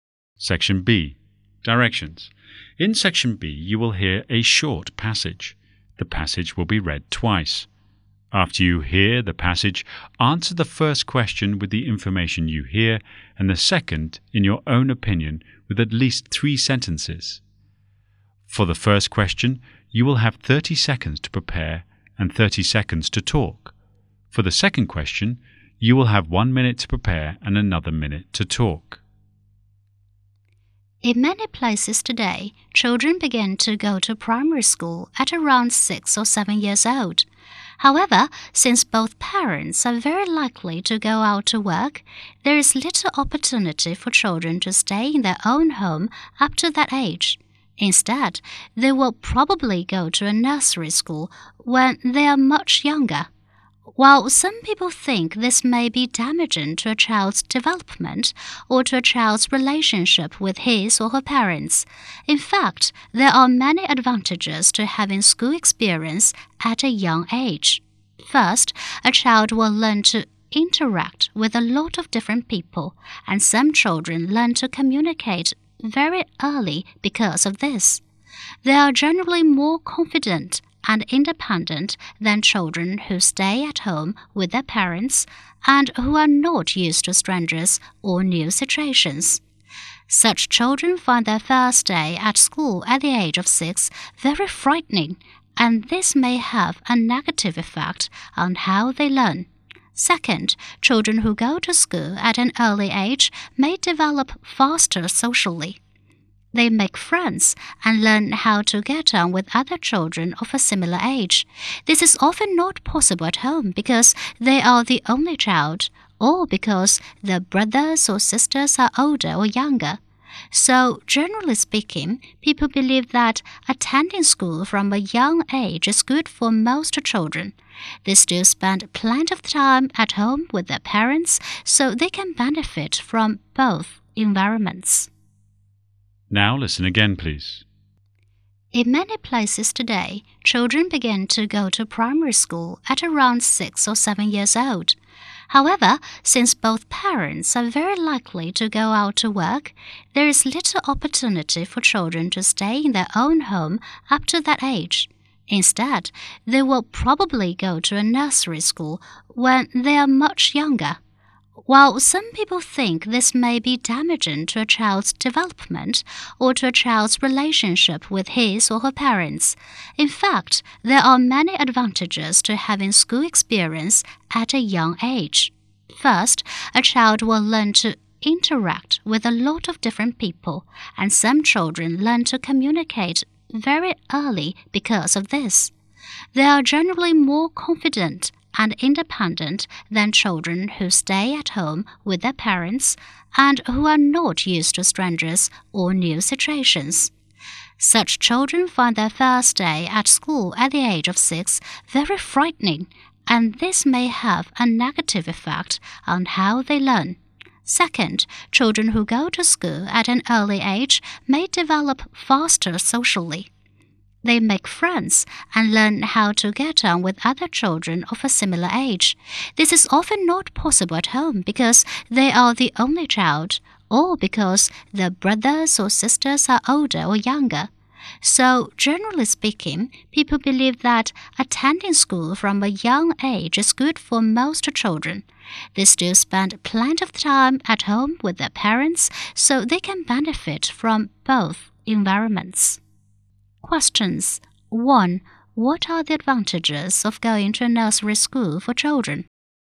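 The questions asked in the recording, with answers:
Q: What are the advantages of going to a nursery school for children?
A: Children learn to interact with many different people and communicate early, becoming more confident and independent; they also develop faster socially, making friends and learning to get on with children of a similar age.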